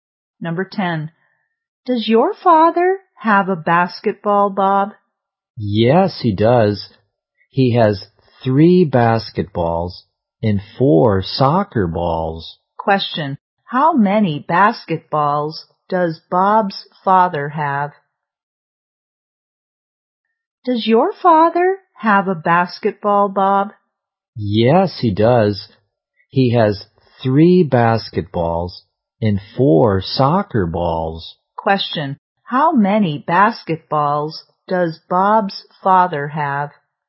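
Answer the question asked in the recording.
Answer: Three.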